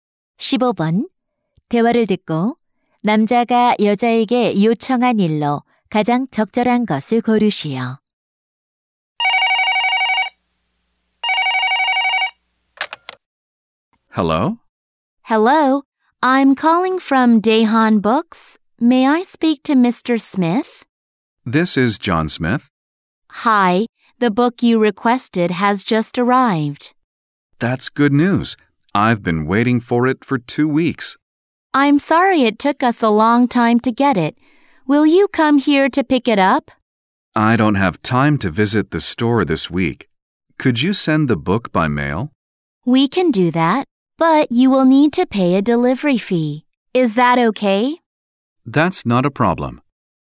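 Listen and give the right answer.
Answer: 책을 우편으로 보내 주기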